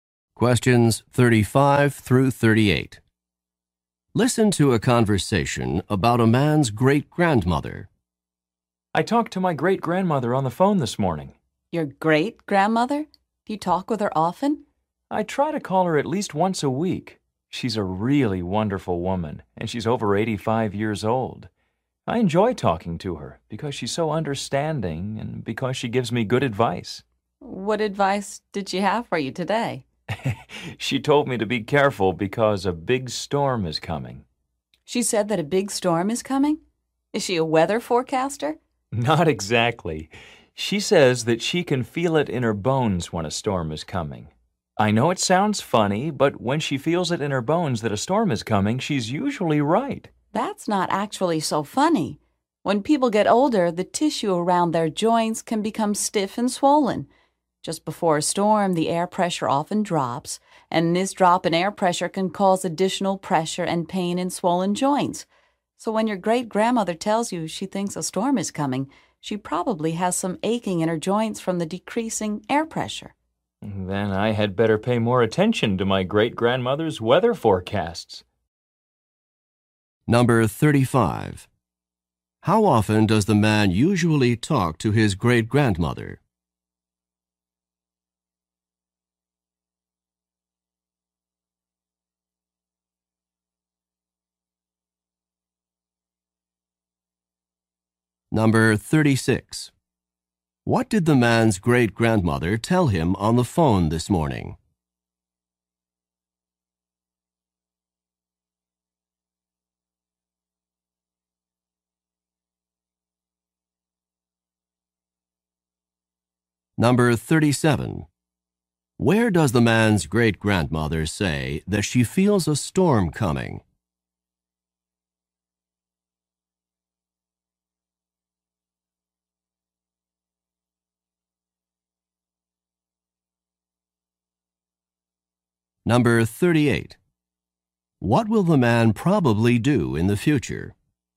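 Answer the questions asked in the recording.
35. At least once a week
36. To be careful because a big storm is coming
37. In her bones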